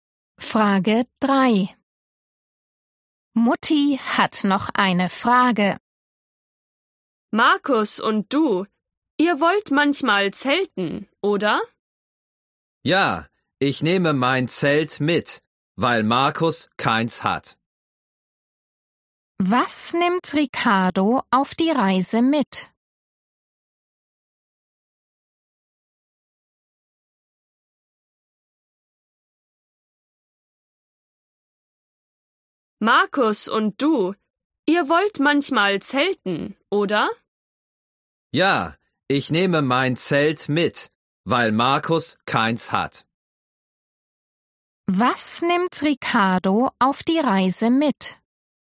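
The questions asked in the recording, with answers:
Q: Was nimmt Ricardo auf die Reise mit?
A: sein Zelt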